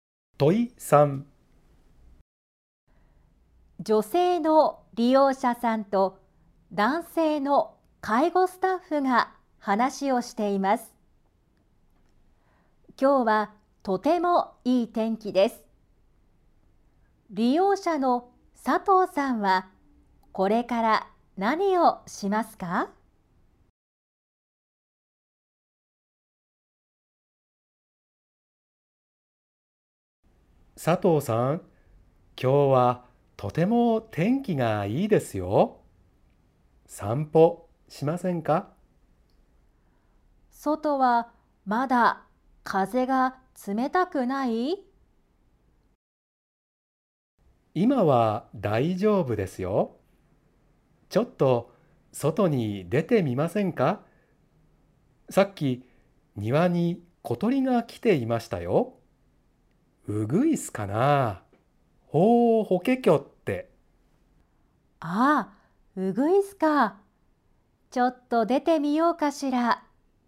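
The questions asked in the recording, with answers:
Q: 利用者の佐藤さんはこれから何をしますか?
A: 散歩(外に出る)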